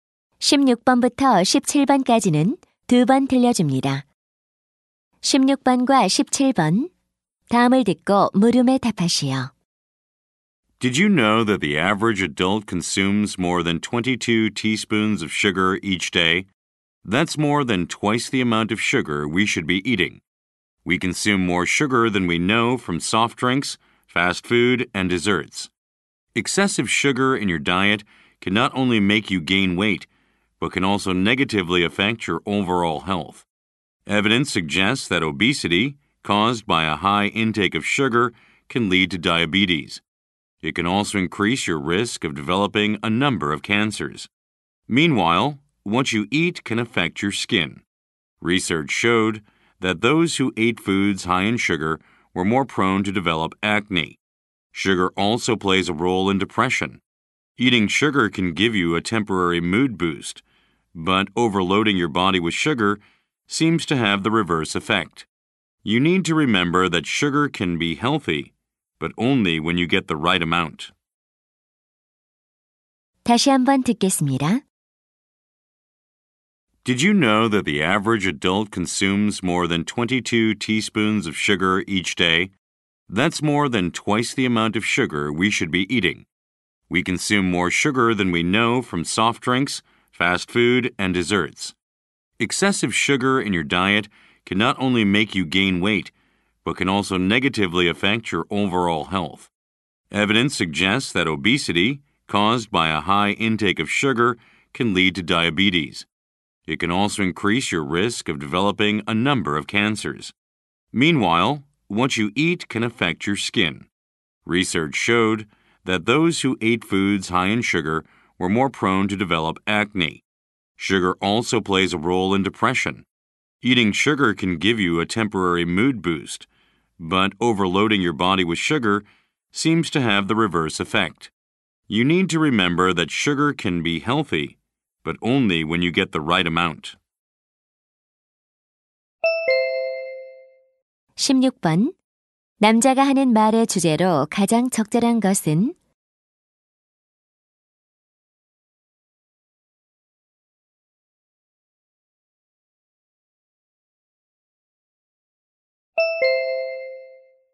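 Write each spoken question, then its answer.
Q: 남자가 하는 말의 주제로 가장 적절한 것은?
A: 과도한 설탕 섭취가 건강에 미치는 악영향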